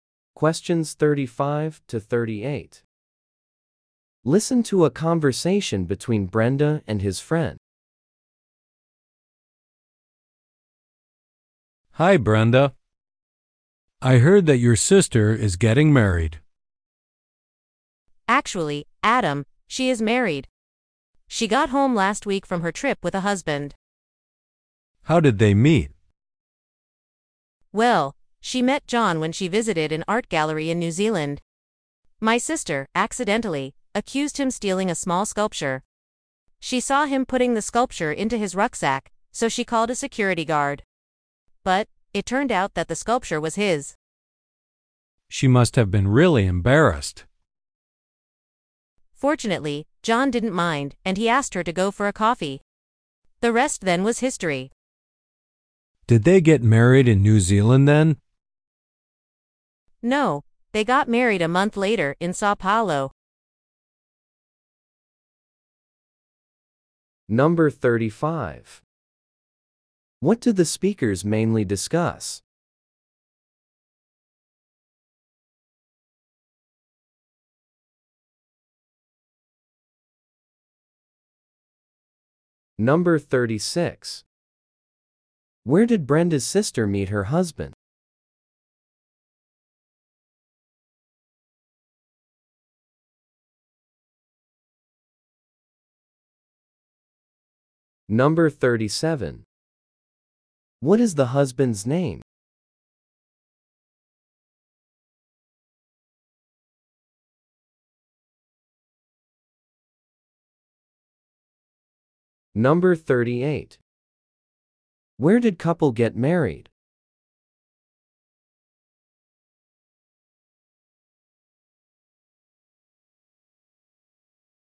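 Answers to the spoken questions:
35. How Brenda's sister met her husband and got married
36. At an art gallery in New Zealand
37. John
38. In Sao Paulo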